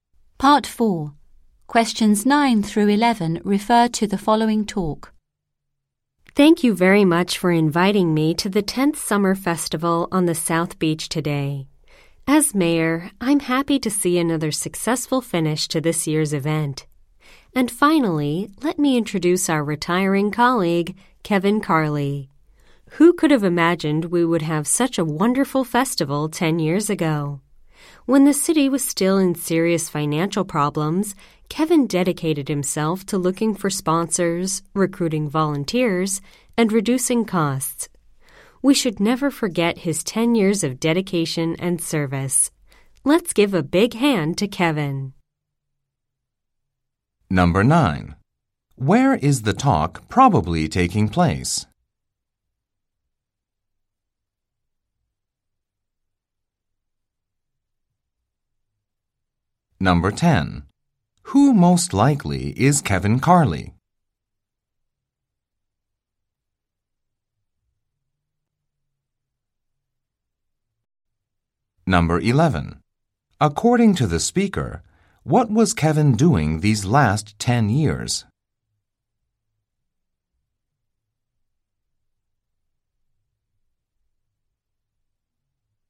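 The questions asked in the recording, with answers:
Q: Where is the talk probably taking place?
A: At the Summer Festival on the South Beach

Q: According to the speaker, what was Kevin doing these last 10 years?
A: Working on the festival: finding sponsors, recruiting volunteers and reducing costs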